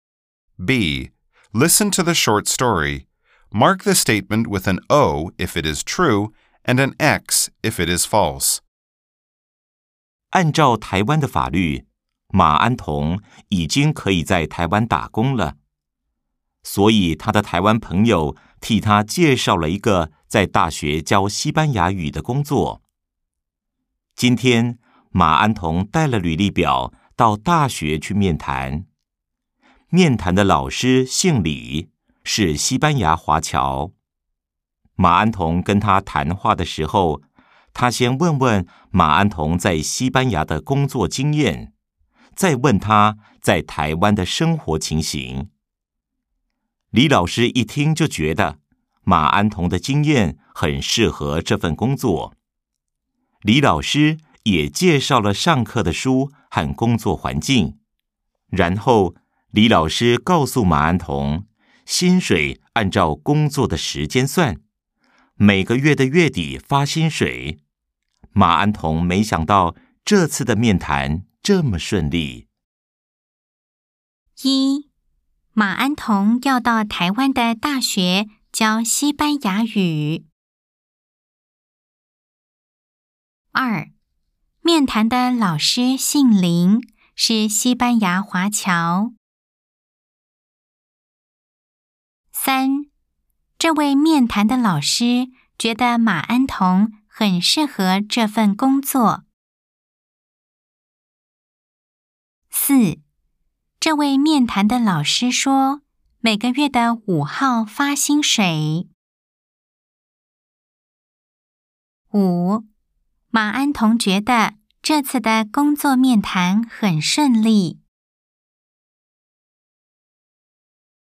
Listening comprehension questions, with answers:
B. Nghe đoạn hội thoại. Đánh dấu ⭕ nếu đúng, ✖ nếu sai.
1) 馬安同要到台灣的大學教西班牙語。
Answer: O

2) 面談的老師姓林,是西班牙華僑。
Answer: X

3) 這位面談的老師覺得馬安同很適合這份工作。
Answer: O

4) 這位面談的老師說,每個月的五號發薪水。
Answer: X

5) 馬安同覺得這次的工作面談很順利。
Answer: O